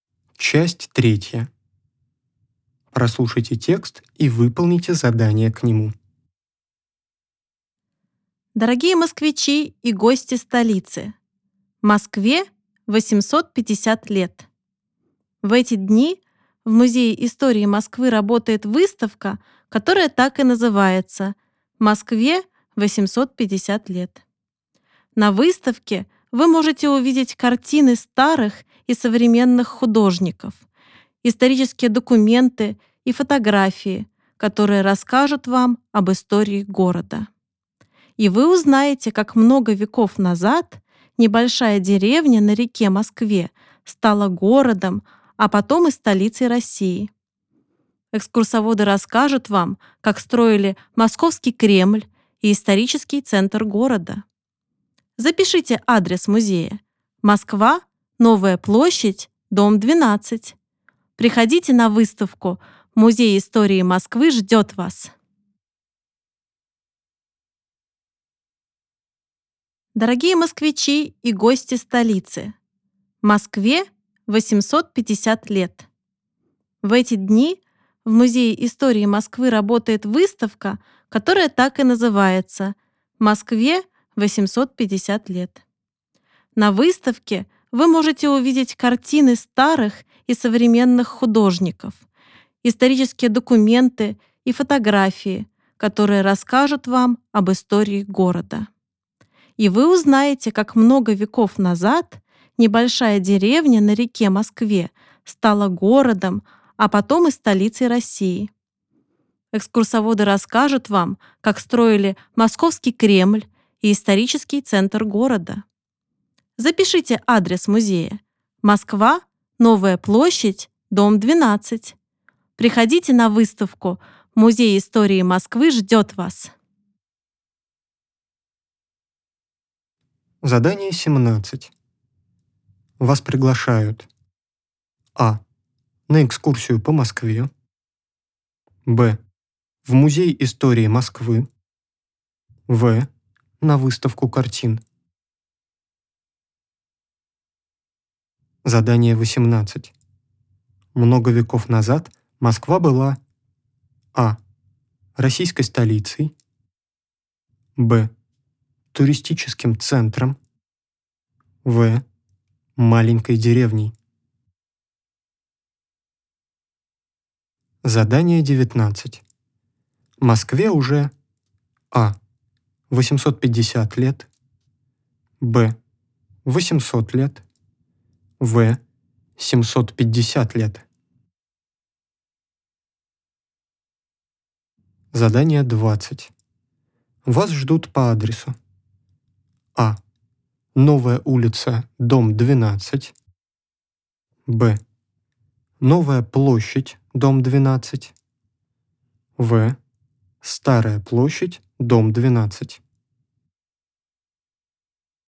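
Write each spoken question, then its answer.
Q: Вас приглашают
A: Б: В Музей истории Москвы.

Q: Много веков назад Москва была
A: В: Маленькой деревней.

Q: Москве уже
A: А: 850 лет.

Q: Вас ждут по адресу.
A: Б: Новая площадь, дом 12.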